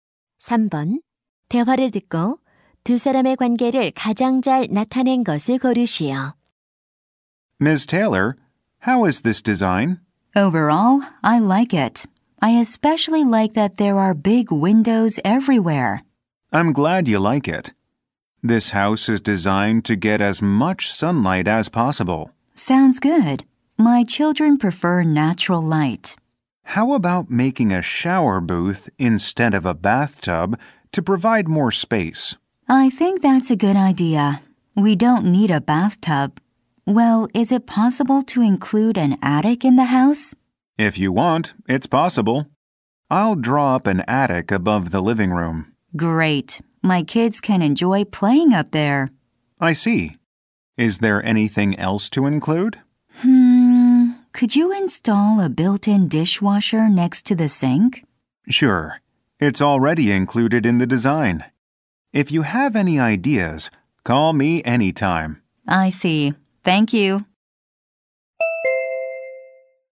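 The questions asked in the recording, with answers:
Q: 대화를 듣고 두 사람의 관계를 가장 잘 나타낸 것을 고르시오.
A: 건축가 - 의뢰인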